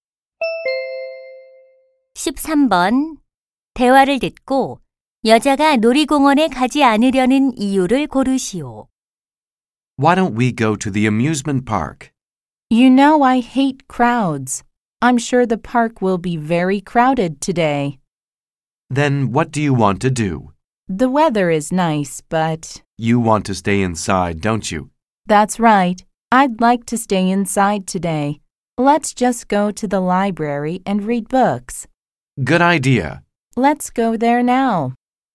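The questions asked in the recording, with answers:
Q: 대화를 듣고 여자가 놀이공원에 가지 않으려는 이유를 고르시오.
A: 사람이 붐비는 것을 싫어해서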